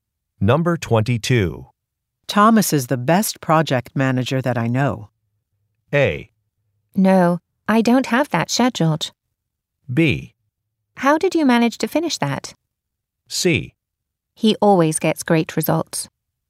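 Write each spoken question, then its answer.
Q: Thomas is the best project manager that I know.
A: C: He always gets great results.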